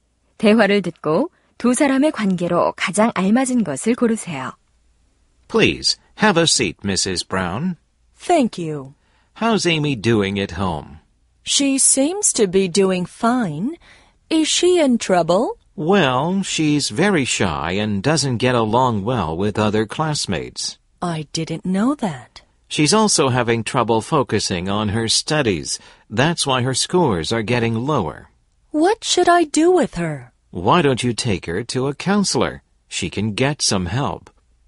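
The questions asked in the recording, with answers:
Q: 대화를 듣고 두 사람의 관계로 가장 알맞은 것을 고르세요.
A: 교사와 학부모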